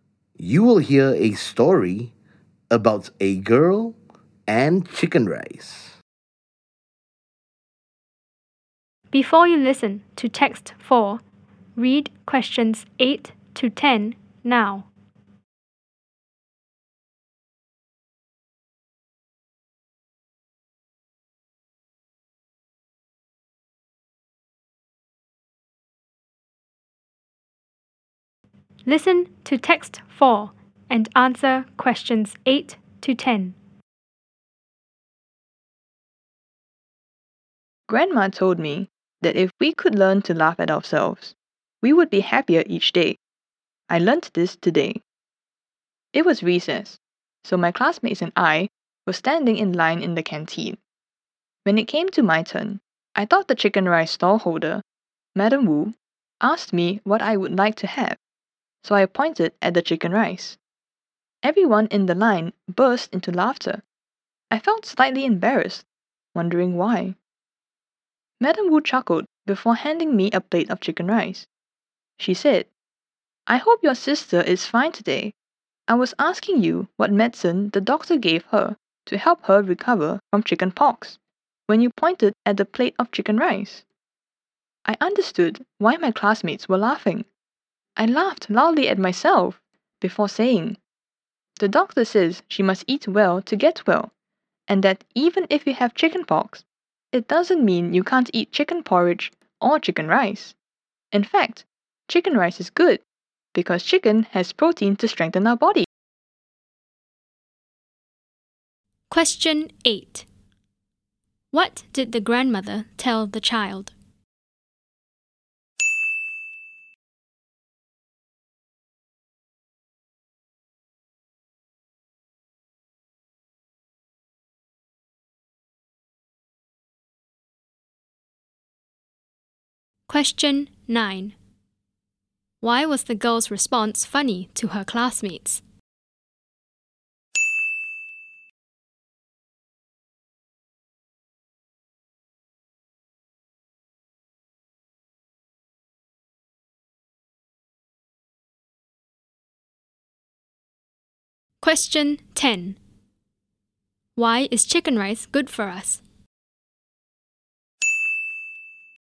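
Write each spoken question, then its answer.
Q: What did the grandmother tell the child?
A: If we could learn to laugh at ourselves, we would be happier each day

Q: Why was the girl's response funny to her classmates?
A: Madam Wu asked what medicine the doctor gave her sister, but she pointed at the chicken rice

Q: Why is chicken rice good for us?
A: Chicken has protein to strengthen our body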